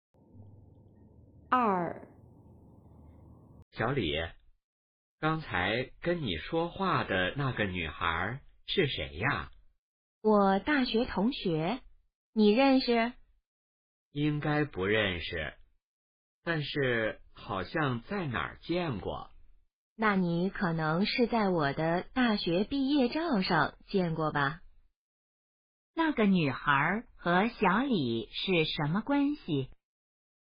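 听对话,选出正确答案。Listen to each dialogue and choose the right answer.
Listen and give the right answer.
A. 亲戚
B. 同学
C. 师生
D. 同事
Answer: B. 同学

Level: HSK Level 4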